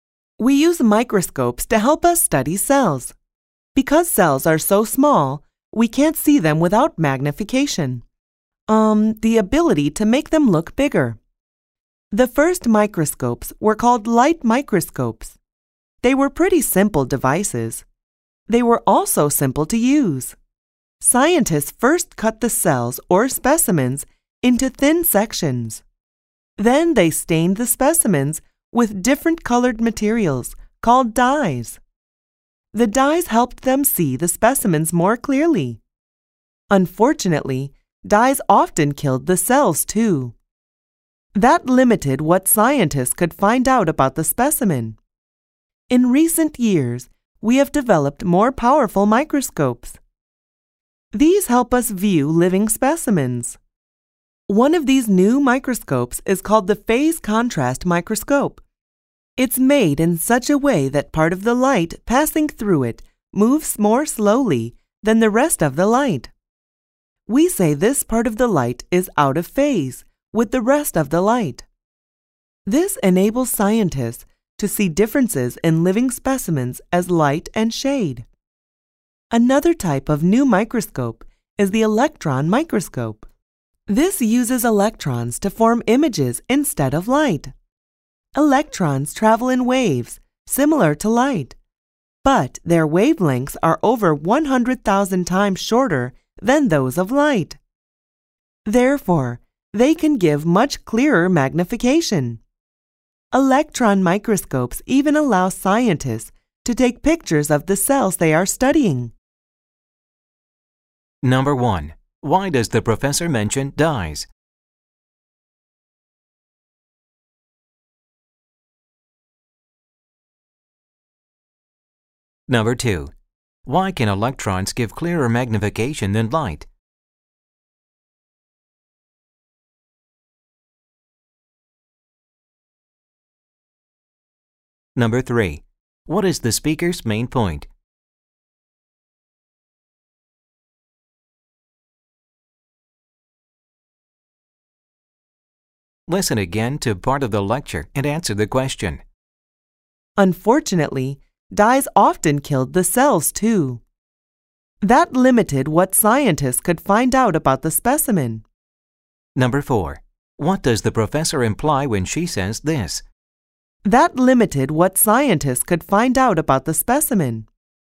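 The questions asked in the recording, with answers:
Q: Why does the professor mention dyes?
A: To explain a drawback of early light microscopes: dyes helped show specimens but often killed the cells

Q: Why can electrons give clearer magnification than light?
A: Their wavelengths are over 100,000 times shorter than light's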